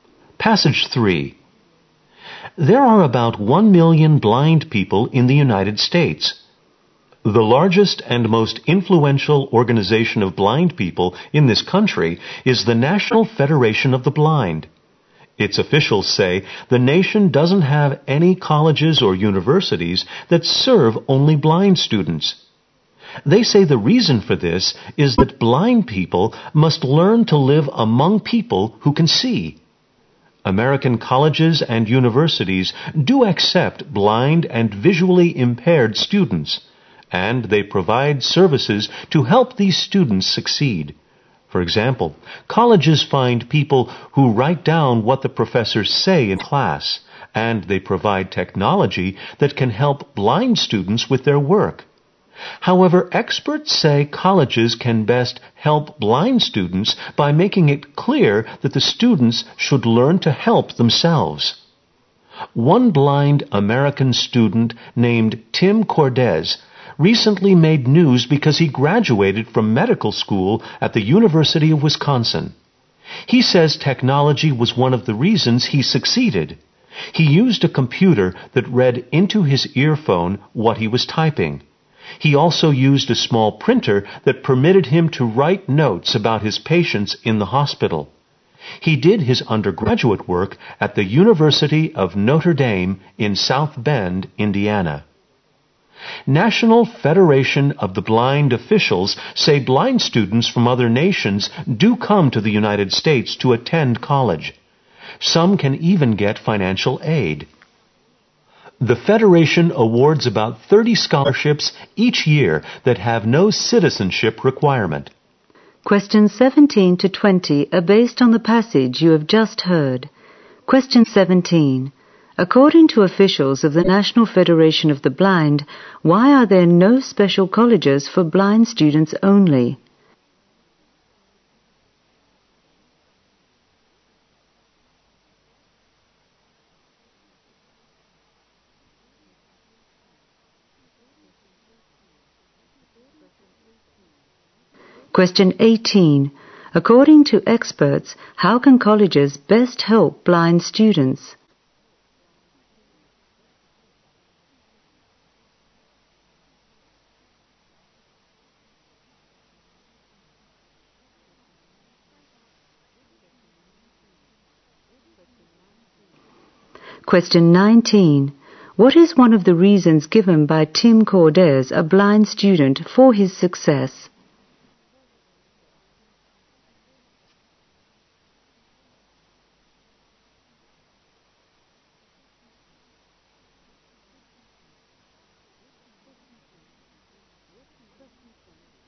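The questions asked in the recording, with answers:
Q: According to officials of the National Federation of the Blind, why are there no special colleges for blind students only?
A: Blind people must learn to live among sighted people

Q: According to experts, how can colleges best help blind students?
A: By making clear they should learn to help themselves

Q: What is one of the reasons given by Tim Cordes, a blind student, for his success?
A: Technology

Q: What can blind students from overseas do to study in America according to the National Federation of the Blind?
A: Apply for Federation scholarships with no citizenship requirement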